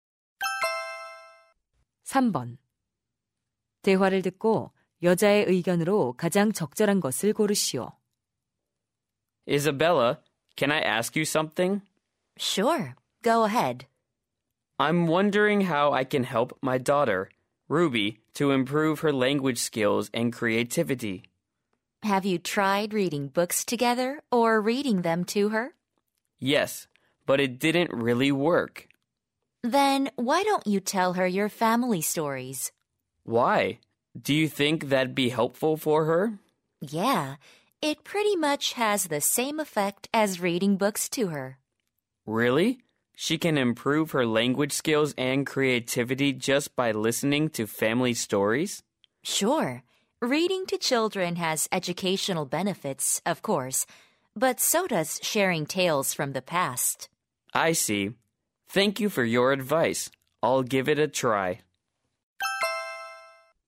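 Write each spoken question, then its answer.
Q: 대화를 듣고 여자의 의견으로 가장 적절한 것을 고르시오.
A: 가족 이야기를 들려주는 것은 아이의 언어 능력과 창의력 향상에 도움이 된다.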